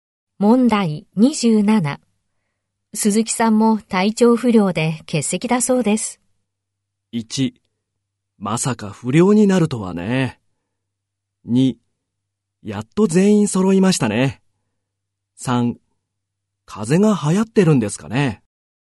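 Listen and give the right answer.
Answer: 3: 風邪が流行ってるんですかね。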